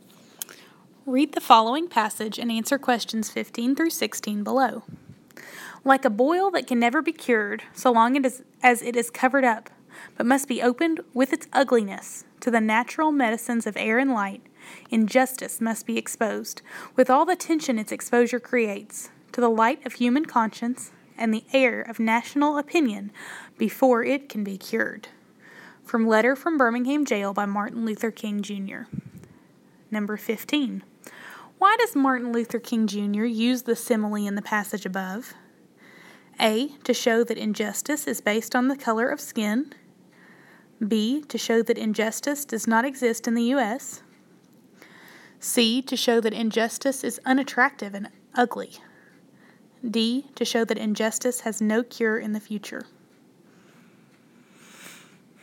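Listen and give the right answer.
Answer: C: To show that injustice is unattractive and ugly.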